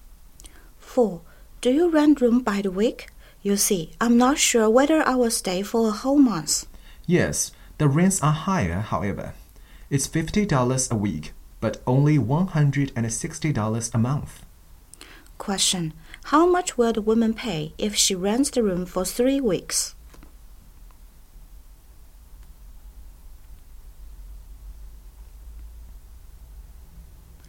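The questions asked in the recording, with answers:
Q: How much will the woman pay if she rents the room for 3 weeks?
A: $150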